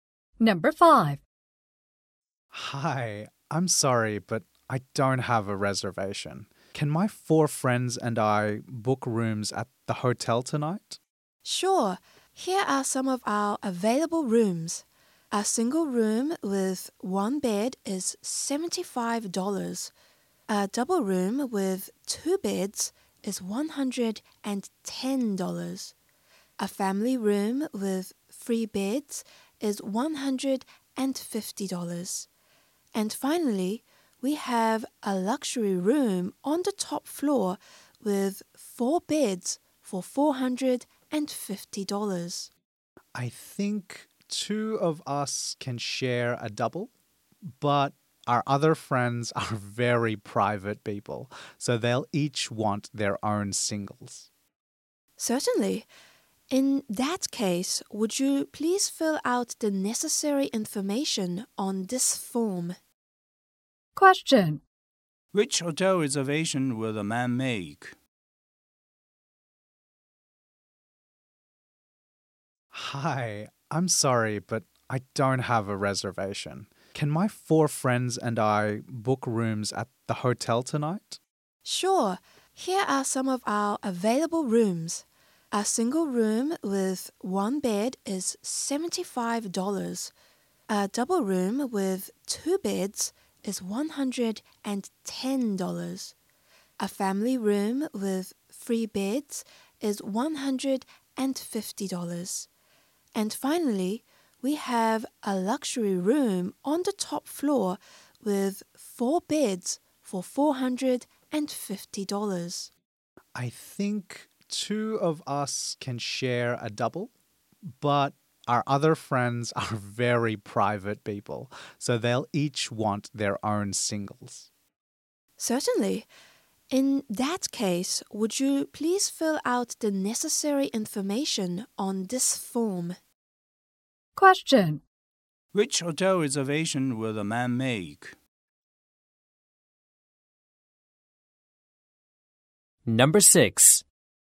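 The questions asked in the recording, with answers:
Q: Which hotel reservation will the man make?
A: One double room and three single rooms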